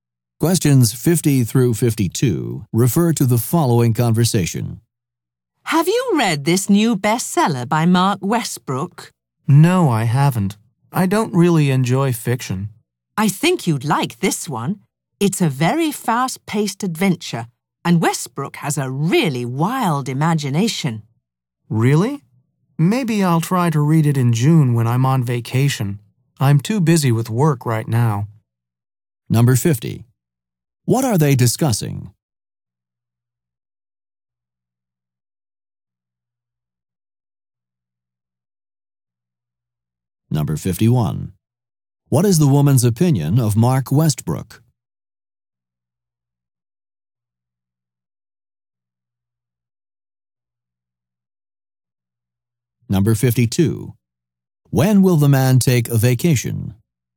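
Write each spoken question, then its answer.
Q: What are they discussing?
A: A new bestselling book

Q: What is the woman's opinion of Mark Westbrook?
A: He has a really wild imagination

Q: When will the man take a vacation?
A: In June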